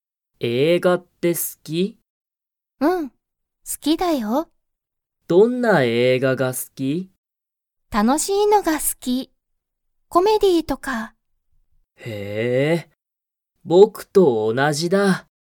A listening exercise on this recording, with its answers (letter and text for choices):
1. リカは、____映画えいがが好すきだ。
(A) 安やすい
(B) いい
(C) きれいな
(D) 楽たのしい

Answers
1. (D) 楽たのしい